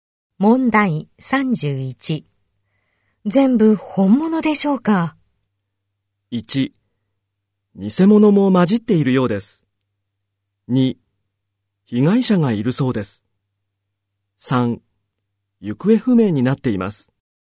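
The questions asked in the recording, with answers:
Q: 全部本物でしょうか?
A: 1: 偽物も混じっているようです。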